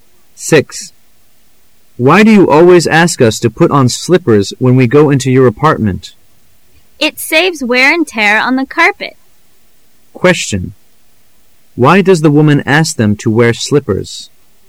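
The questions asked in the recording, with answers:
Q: Why does the woman ask them to wear slippers?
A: To save wear and tear on the carpet

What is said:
[解析] M: Why do you always ask us to put on slippers when we go into your apartment? W: It saves wear and tear on the carpet. Q: Why does the woman ask them to wear slippers?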